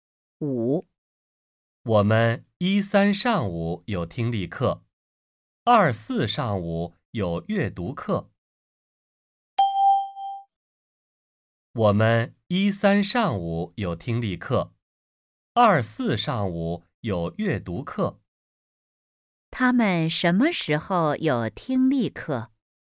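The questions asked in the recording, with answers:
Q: 他们什么时候有听力课?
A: 星期一、星期三上午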